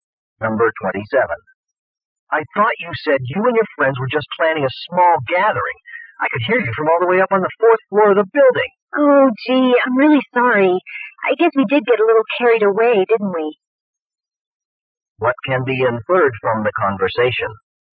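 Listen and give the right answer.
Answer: The party was too loud.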